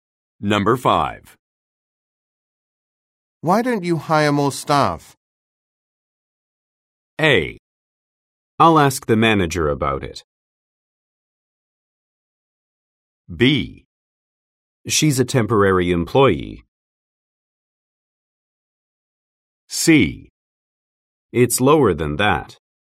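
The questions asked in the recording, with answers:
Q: Why don't you hire more staff?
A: A: I'll ask the manager about it.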